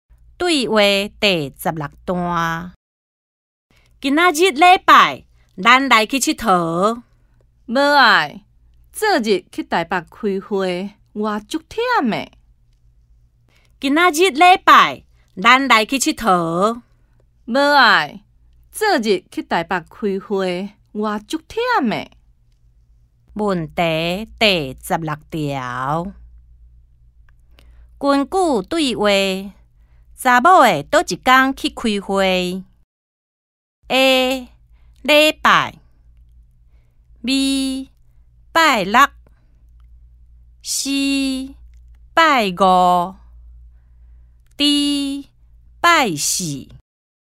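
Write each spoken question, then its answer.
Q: 根据对话,查某的倒一天去开会?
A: B: 拜六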